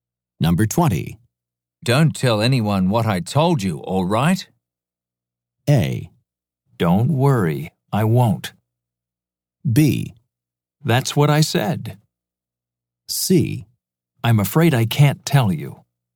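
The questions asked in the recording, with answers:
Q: Don't tell anyone what I told you, all right?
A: A: Don't worry, I won't.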